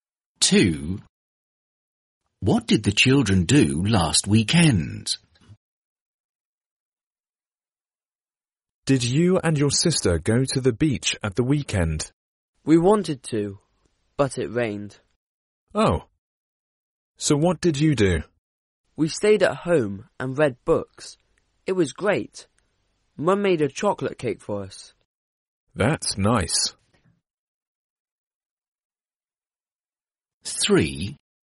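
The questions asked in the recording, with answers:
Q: What did the children do last weekend?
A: stayed at home and read books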